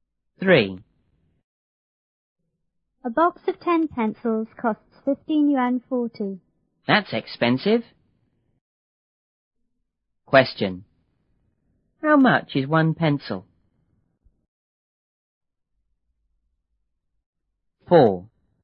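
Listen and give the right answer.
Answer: 1 yuan 54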